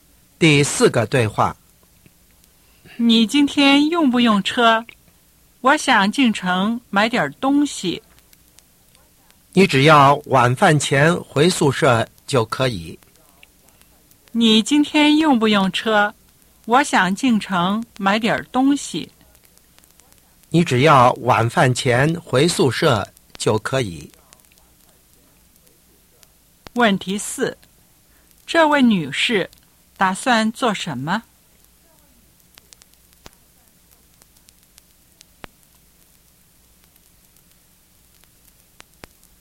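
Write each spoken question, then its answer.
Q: 这位女士打算做什么?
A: 进城买东西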